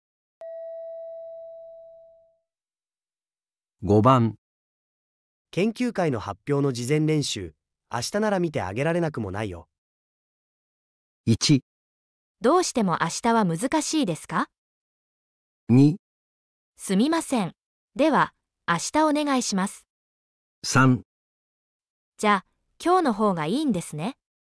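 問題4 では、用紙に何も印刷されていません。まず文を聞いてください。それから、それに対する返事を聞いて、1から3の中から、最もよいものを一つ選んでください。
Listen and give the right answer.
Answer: 2

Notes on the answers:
对方是"明天也可以帮你看",意思是"如果你要的话,明天行"。此时要接受这个好意,选项2"那就明天拜托你了"最自然

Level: N1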